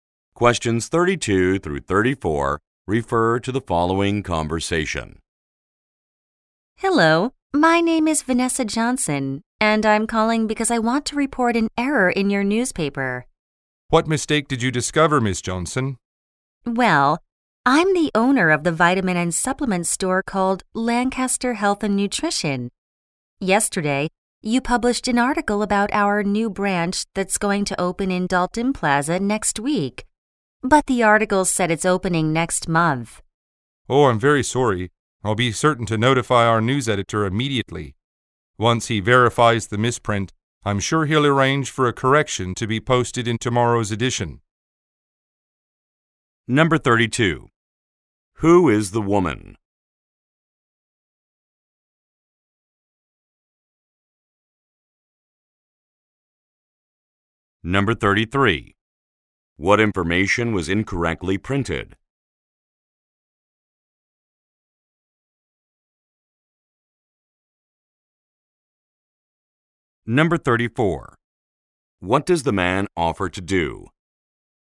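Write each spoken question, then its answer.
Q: Who is the woman?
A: The owner of a vitamin and supplement store

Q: What information was incorrectly printed?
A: The opening date of the new branch

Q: What does the man offer to do?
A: Notify the news editor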